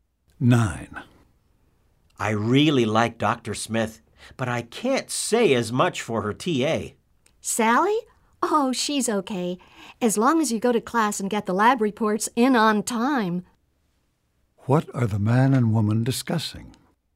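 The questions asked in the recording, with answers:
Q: What are the man and woman discussing?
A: Dr. Smith's teaching assistant, Sally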